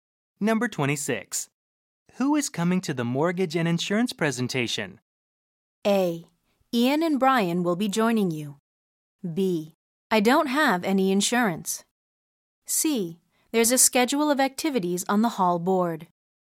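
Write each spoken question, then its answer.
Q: Who is coming to the mortgage and insurance presentation?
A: A: Ian and Brian will be joining you.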